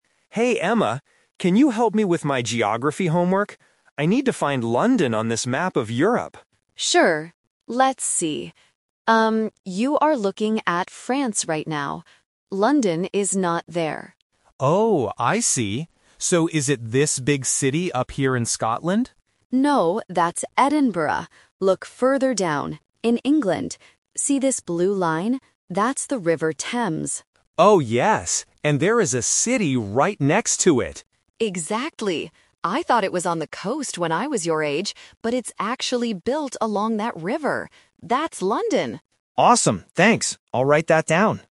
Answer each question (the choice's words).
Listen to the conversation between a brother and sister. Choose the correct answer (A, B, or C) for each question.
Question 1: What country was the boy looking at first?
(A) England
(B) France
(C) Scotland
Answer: France

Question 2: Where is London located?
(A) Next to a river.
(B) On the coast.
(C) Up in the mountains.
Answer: Next to a river.

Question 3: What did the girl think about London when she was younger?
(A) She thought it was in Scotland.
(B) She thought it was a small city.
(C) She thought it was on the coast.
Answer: She thought it was on the coast.

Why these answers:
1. Why B is correct: The girl clearly tells her brother at the beginning: "you are looking at France right now." Why A & C are traps: Scotland is mentioned right after as the boy's second guess. England is where London actually is, but it wasn't where the boy looked first.
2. Why A is correct: The girl points out the River Thames and confirms that London is "built along that river." Why B is a trap: The coast is mentioned, but the girl says she used to think it was on the coast (a classic A2 distractor using past belief vs. present reality). Why C is wrong: Mountains are not mentioned in the conversation at all.
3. Why C is correct: The girl says, "I thought it was on the coast when I was your age..." Why A is a trap: Scotland is mentioned in the audio, but that was the boy's incorrect guess, not the girl's past belief. Why B is wrong: The size of the city (small) is never discussed.

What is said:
Boy: Hey, Emma, can you help me with my geography homework? I need to find London on this map of Europe.
Girl: Sure! Let's see. Um, you are looking at France right now. London is not there.
Boy: Oh, I see. So, is it this big city up here in Scotland?
Girl: No, that's Edinburgh. Look further down, in England. See this blue line? That's the River Thames.
Boy: Oh, yes! And there is a city right next to it.
Girl: Exactly. I thought it was on the coast when I was your age, but it's actually built along that river. That's London!